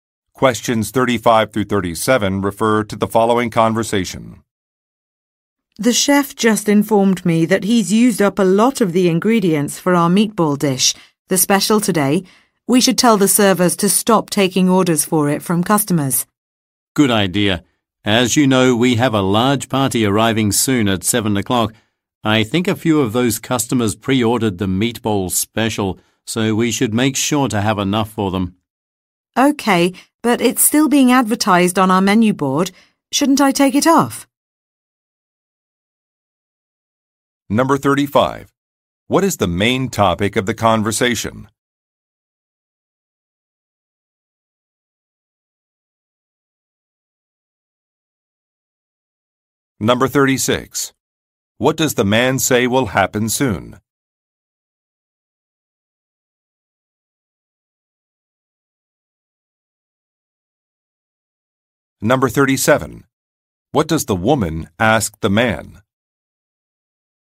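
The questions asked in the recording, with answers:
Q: What is the main topic of the conversation?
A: A menu item (the meatball special) running low on ingredients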